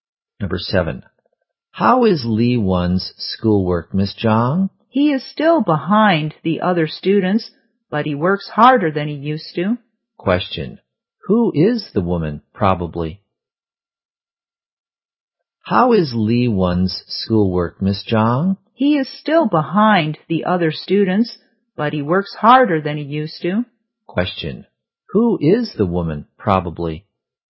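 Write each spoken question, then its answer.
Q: Question. Who is the woman, probably?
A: A teacher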